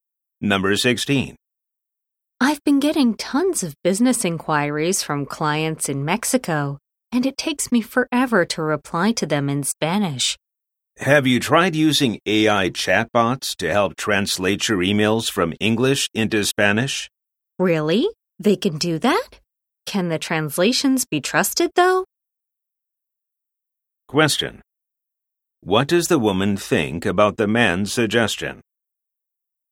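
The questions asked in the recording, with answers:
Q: What does the woman think about the man's suggestion?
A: She doubts the translations can be trusted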